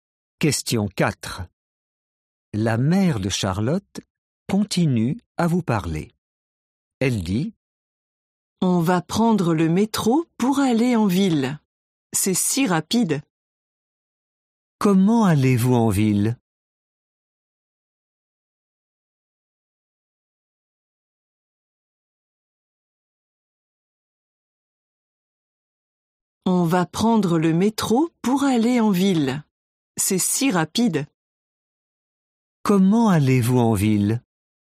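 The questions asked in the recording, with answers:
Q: Comment allez-vous en ville?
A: En métro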